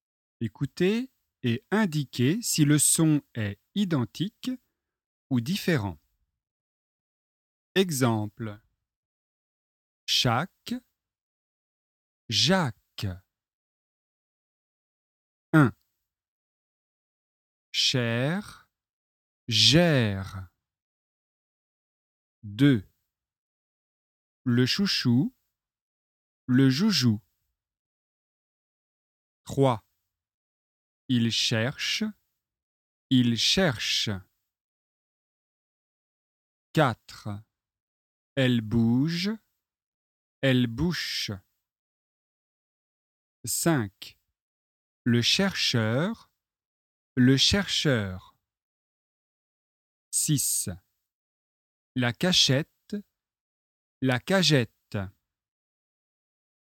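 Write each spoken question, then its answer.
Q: Cher. Gère.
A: différent

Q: Le chouchou. Le joujou.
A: différent

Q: Elle bouge. Elle bouche.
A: différent

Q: La cachette. La cagette.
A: différent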